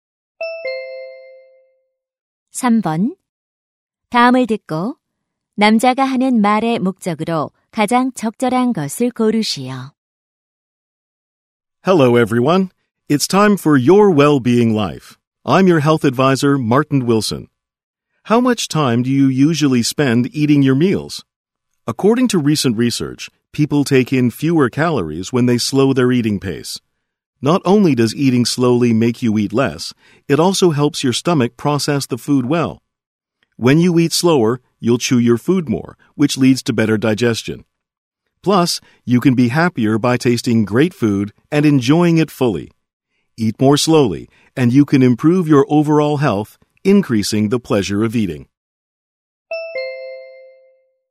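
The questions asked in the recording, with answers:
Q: 다음을 듣고 남자가 하는 말의 목적으로 가장 적절한 것을 고르시오.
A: 천천히 먹는 식습관을 권장하려고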